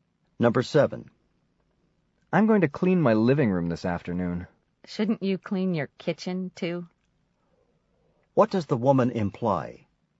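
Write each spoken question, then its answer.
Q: What does the woman imply?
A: The kitchen needs cleaning too.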